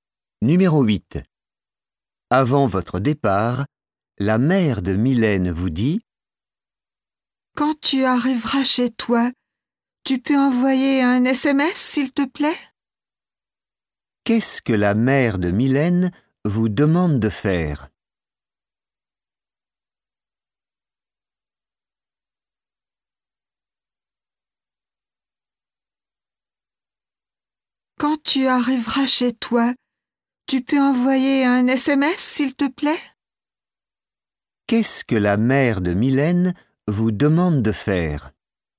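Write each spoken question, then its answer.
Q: Qu'est-ce que la mère de Mylène vous demande de faire ?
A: Envoyer un SMS en arrivant chez vous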